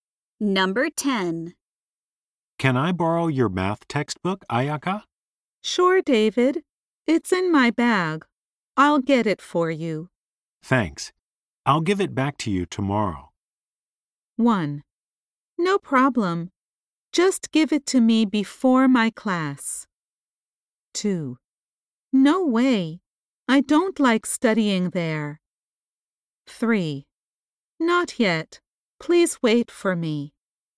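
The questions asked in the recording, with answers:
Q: Thanks. I'll give it back to you tomorrow.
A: 1: No problem. Just give it to me before my class.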